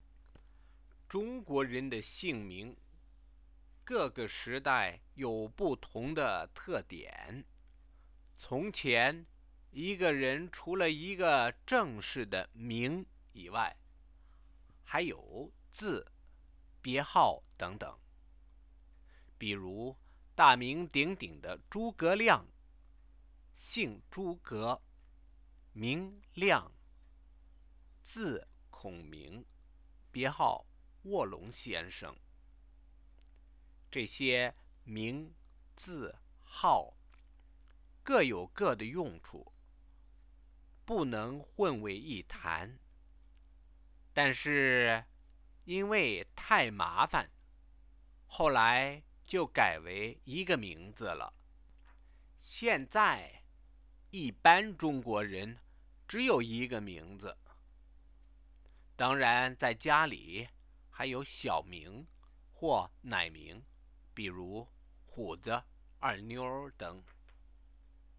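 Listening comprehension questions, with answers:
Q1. How many types of names did a Chinese person have in the old days?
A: Besides a formal given name (名), a person also had a courtesy name (字) and a literary name (别号), so three types.

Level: 2nd year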